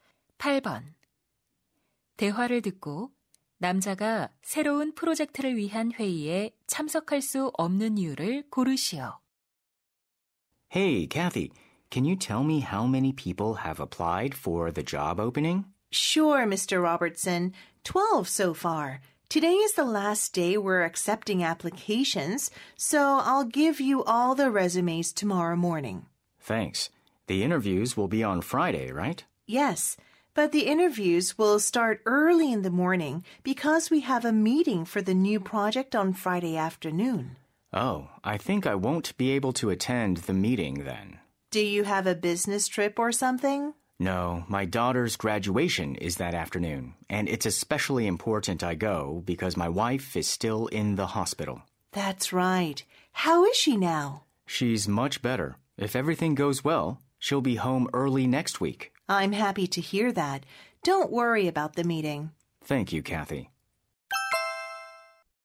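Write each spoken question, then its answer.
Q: 대화를 듣고 남자가 새로운 프로젝트를 위한 회의에 참석할 수 없는 이유를 고르시오.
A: 딸의 졸업식에 가야 해서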